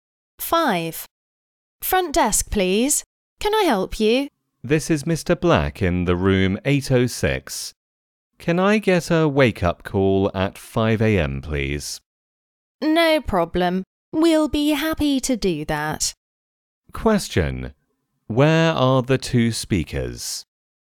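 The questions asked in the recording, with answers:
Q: Where are the two speakers?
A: In a hotel.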